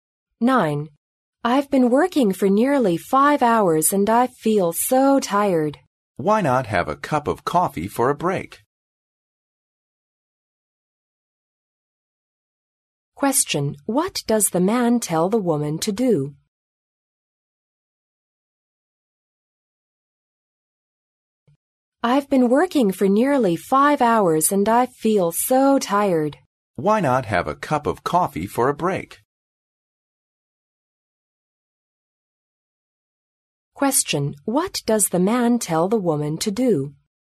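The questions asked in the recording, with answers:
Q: What does the man tell the woman to do?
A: Have a cup of coffee for a break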